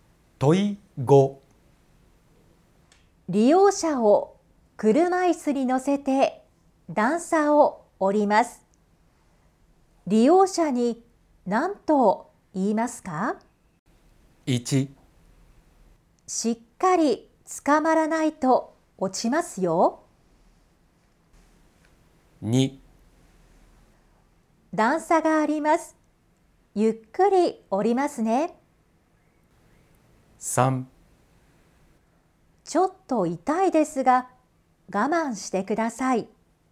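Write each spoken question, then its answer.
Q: 利用者に何と言いますか?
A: 2: 段差があります。ゆっくり降りますね。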